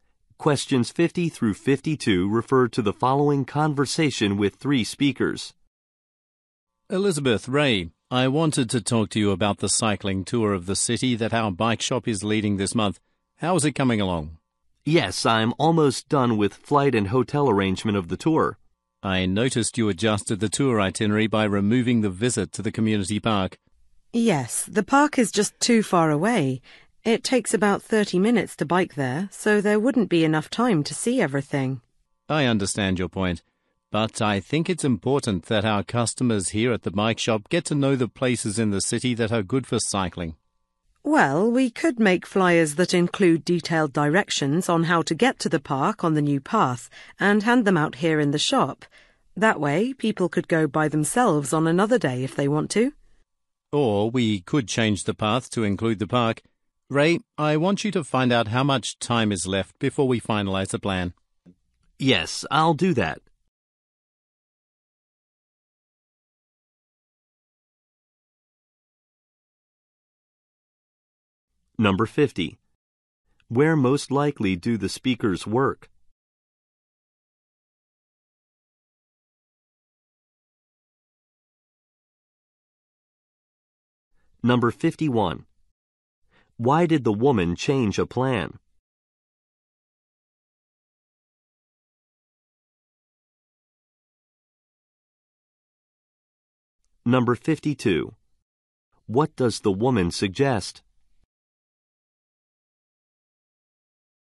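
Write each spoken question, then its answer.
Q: Where most likely do the speakers work?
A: At a bike shop

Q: Why did the woman change a plan?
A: The park is too far away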